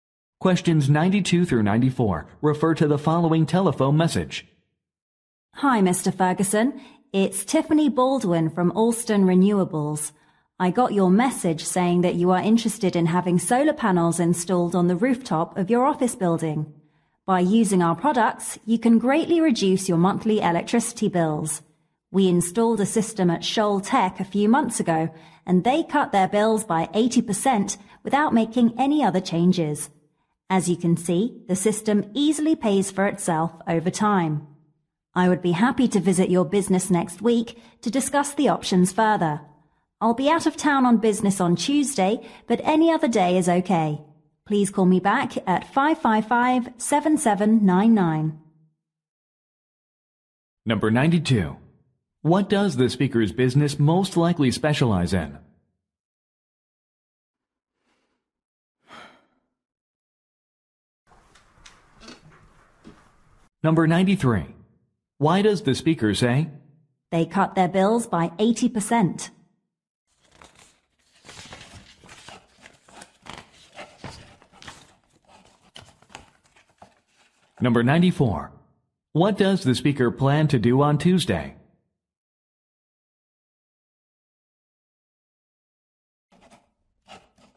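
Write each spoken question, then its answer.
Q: What does the speaker's business most likely specialize in?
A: Solar panel installation

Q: Why does the speaker say?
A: To show that the system pays for itself

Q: What does the speaker plan to do on Tuesday?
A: Go out of town on business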